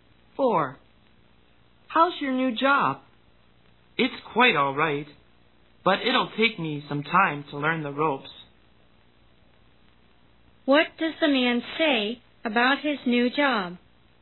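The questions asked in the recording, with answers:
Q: What does the man say about his new job?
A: It will take him some time to learn how to do it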